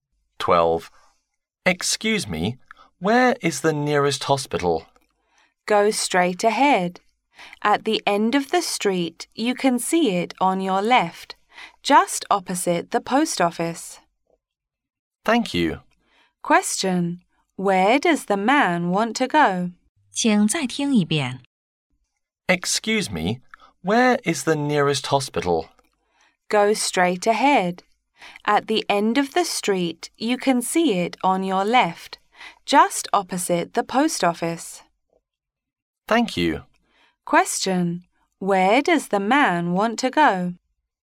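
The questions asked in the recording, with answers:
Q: Where does the man want to go?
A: The nearest hospital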